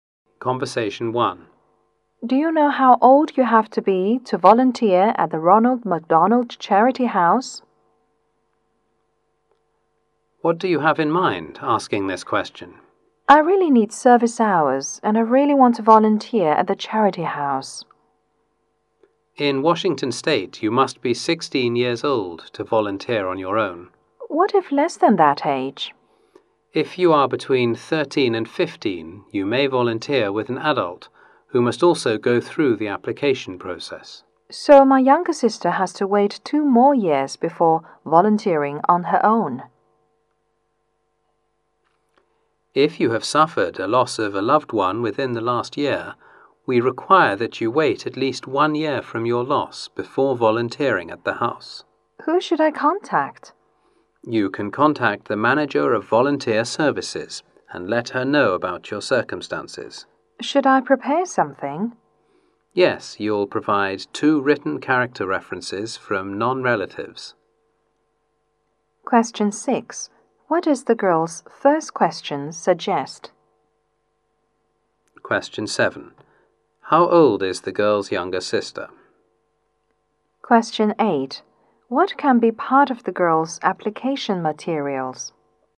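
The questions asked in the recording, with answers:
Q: How old is the girl's younger sister?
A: 14 years old

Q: What can be part of the girl's application materials?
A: Two written character references from non-relatives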